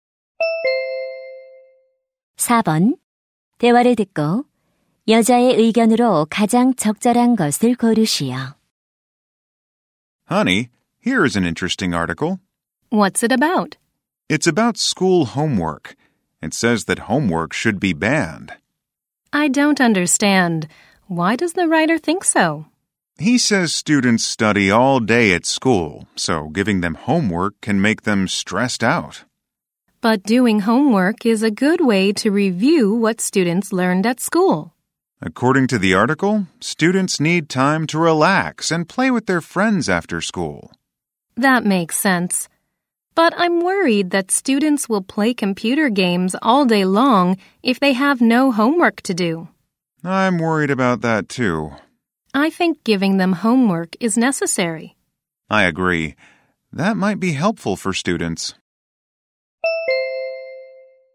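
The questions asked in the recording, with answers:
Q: 대화를 듣고 여자의 의견으로 가장 적절한 것을 고르시오.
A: 학생들에게 숙제를 내주는 것이 필요하다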